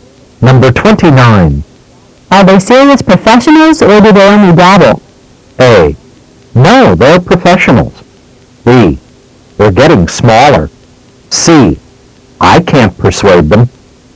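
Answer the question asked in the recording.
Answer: A: No, they're professionals.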